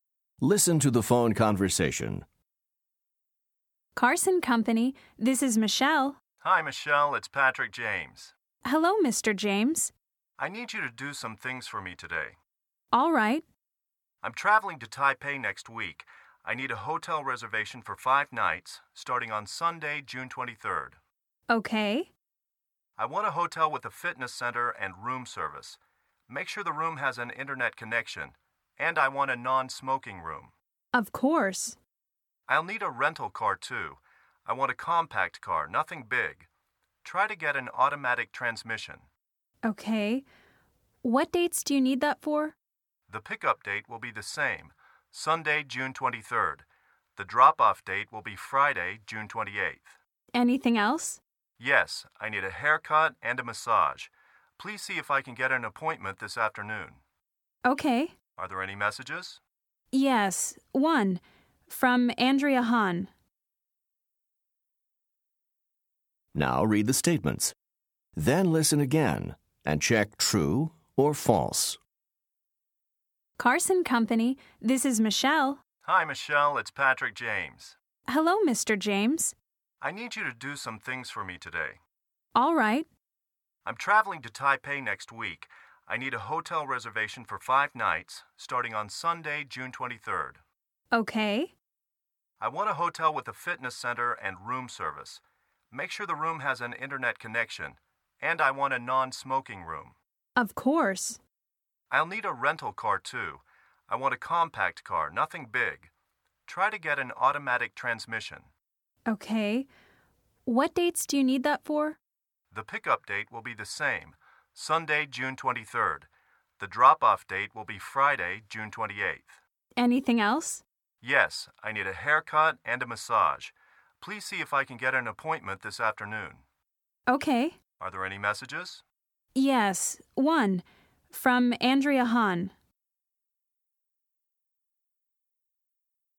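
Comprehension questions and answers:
Listen to the phone conversation. Then choose True or False for each statement.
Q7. Mr. James will check into the hotel on June 23rd.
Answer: True

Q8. He wants a hotel with a fitness center and a sauna.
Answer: False

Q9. He wants a smoking room with an Internet connection.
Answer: False

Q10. Mr. James would rather rent a small car.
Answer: True

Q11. He will pick up the rental car the day after he arrives.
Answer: False

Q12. He wants to get a haircut today.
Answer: True

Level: Top Notch 2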